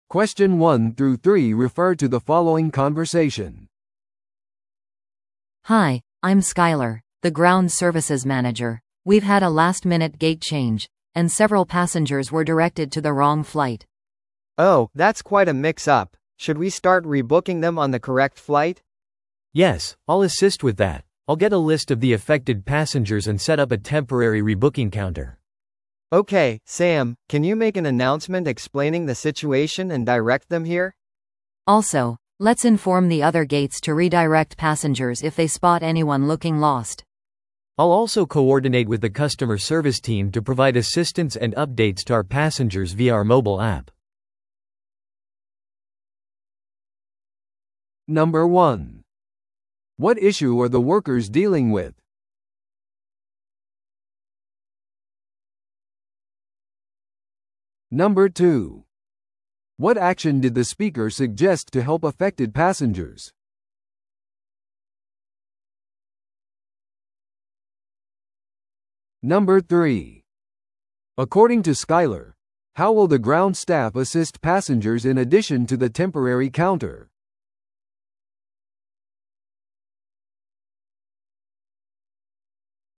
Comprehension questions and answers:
Listen to the audio below and answer the questions.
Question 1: What issue are the workers dealing with?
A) 空港のセキュリティ問題。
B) 誤った搭乗券が発行された。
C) コンピューターシステムの技術的な不具合。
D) ゲート変更による乗客間の混乱。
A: D) ゲート変更による乗客間の混乱。

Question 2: What action did the speaker suggest to help affected passengers?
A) 空港での無料食事を提供する。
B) 一時的な再予約カウンターを設置する。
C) 宿泊用のホテル宿泊施設を提供する。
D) 不便を引き起こしたことに対する払い戻しをする。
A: B) 一時的な再予約カウンターを設置する。

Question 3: According to Skyler, how will the ground staff assist passengers in addition to the temporary counter?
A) 別のターミナルへのシャトルを提供することによって。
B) 無料のフライトアップグレードを提供することによって。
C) アプリのアップデートのためにカスタマーサービスチームと連携することによって。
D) 各乗客を個別に正しいゲートへ案内することによって。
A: C) アプリのアップデートのためにカスタマーサービスチームと連携することによって。

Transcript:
We've had a last-minute gate change, and several passengers were directed to the wrong flight.
B: Oh, that's quite a mix-up. Should we start rebooking them on the correct flight?
C: Yes, I'll assist with that. I'll get a list of the affected passengers and set up a temporary rebooking counter.
B: Okay, Sam, can you make an announcement explaining the situation and direct them here?
A: Also, let's inform the other gates to redirect passengers if they spot anyone looking lost.
C: I'll also coordinate with the customer service team to provide assistance and updates to our passengers via our mobile app.

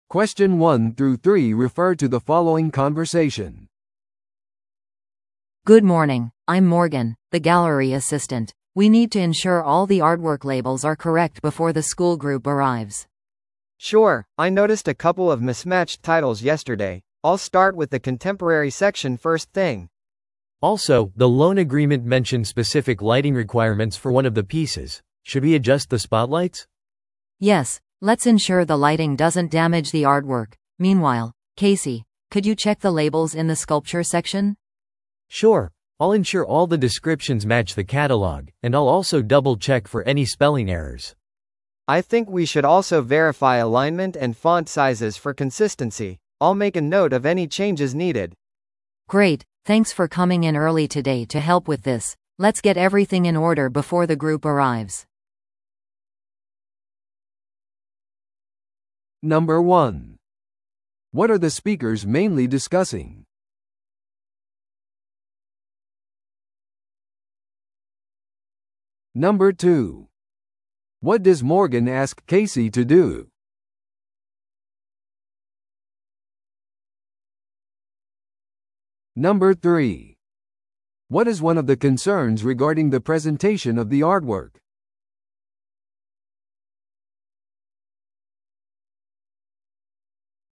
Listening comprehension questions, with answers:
Listen to the audio below and answer the questions.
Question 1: What are the speakers mainly discussing?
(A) 学校の団体をギャラリーを案内する方法。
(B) 訪問前のアートワークのタイトルと照明の確認。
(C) 団体訪問のためのギャラリーの開館時間の変更。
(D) より良いプレゼンテーションのための彫刻の再配置。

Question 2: What does Morgan ask Casey to do?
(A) アートワークの照明を調整すること。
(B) 彫刻セクションのラベルを確認すること。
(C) カタログのアートワークタイトルを修正すること。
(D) ラベルの位置とフォントサイズを測ること。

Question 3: What is one of the concerns regarding the presentation of the artwork?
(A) 各作品の寸法と配置。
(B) 各アートワークの年齢と真正性。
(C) 照明がアートワークを損傷する可能性。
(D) 団体用のアートワーク説明の翻訳。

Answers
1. (B) 訪問前のアートワークのタイトルと照明の確認。
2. (B) 彫刻セクションのラベルを確認すること。
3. (C) 照明がアートワークを損傷する可能性。

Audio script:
A: Good morning, I'm Morgan, the gallery assistant. We need to ensure all the artwork labels are correct before the school group arrives.
B: Sure, I noticed a couple of mismatched titles yesterday. I'll start with the contemporary section first thing.
C: Also, the loan agreement mentioned specific lighting requirements for one of the pieces. Should we adjust the spotlights?
A: Yes, let's ensure the lighting doesn't damage the artwork. Meanwhile, Casey, could you check the labels in the sculpture section?
C: Sure, I'll ensure all the descriptions match the catalogue, and I'll also double-check for any spelling errors.
B: I think we should also verify alignment and font sizes for consistency. I'll make a note of any changes needed.
A: Great, thanks for coming in early today to help with this. Let's get everything in order before the group arrives.

